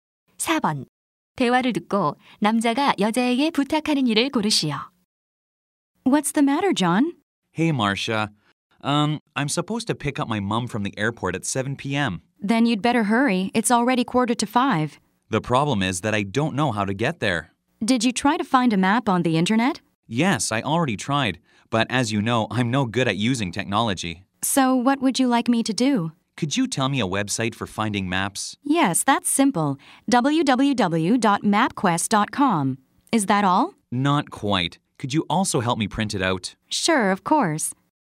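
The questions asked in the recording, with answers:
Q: 대화를 듣고 남자가 여자에게 부탁하는 일을 고르시오.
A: 지도를 찾아 인쇄하는 것 도와주기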